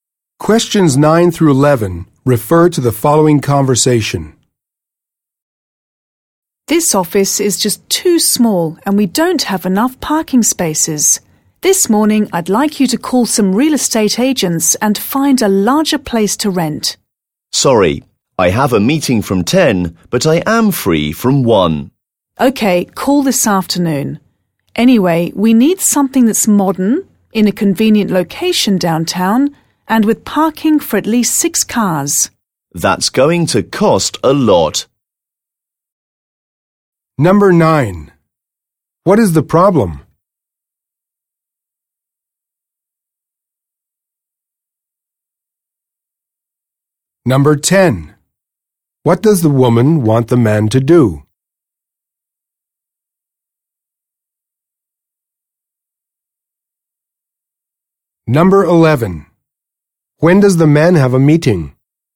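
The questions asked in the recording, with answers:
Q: What is the problem?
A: The office is too small and lacks parking

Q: What does the woman want the man to do?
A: Call real estate agents to find a larger place to rent

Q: When does the man have a meeting?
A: From 10 (in the morning)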